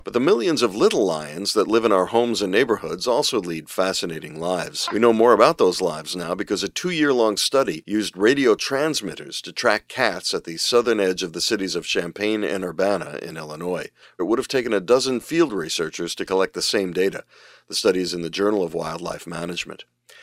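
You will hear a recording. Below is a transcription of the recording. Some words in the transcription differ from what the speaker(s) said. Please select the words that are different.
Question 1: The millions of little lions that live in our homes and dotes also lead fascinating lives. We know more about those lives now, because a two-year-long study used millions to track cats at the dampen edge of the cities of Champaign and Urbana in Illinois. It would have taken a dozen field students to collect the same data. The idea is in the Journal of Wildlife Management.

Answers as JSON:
{"1": "dotes (neighborhoods), millions (radio transmitters), dampen (southern), students (researchers), idea (study)"}

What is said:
The millions of little lions that live in our homes and dotes also lead fascinating lives. We know more about those lives now, because a two-year-long study used millions to track cats at the dampen edge of the cities of Champaign and Urbana in Illinois. 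It would have taken a dozen field students to collect the same data. The idea is in the Journal of Wildlife Management.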